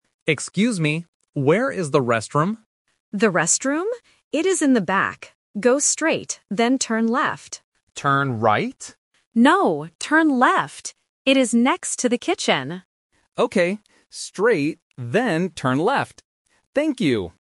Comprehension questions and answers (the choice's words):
Listen to the conversation between a customer and a staff member. Choose the correct answer (A, B, or C).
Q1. What is the customer looking for?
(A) The kitchen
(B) The restroom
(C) A table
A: The restroom

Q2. Which way should the customer turn?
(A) Right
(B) Left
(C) Around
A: Left

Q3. What is the restroom next to?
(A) The door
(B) The window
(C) The kitchen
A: The kitchen

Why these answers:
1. The customer explicitly asks, "Where is the restroom?"
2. The staff clearly instructs, "Go straight, then turn left." The customer also repeats "turn left" at the end.
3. The staff says the restroom is "next to the kitchen."